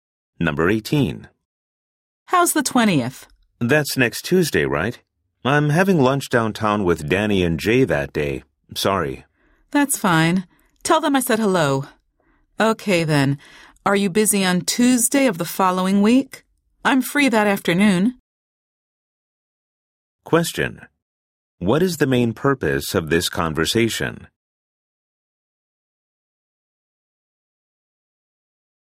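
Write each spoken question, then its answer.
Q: What is the main purpose of this conversation?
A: To schedule a meeting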